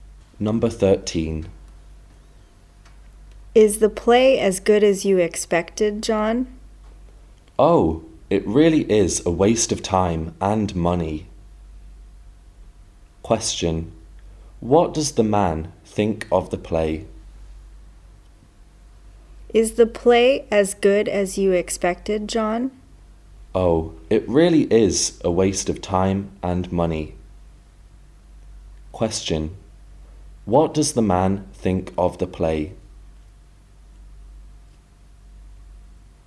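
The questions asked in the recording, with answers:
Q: What does the man think of the play?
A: It was bad, a waste of time and money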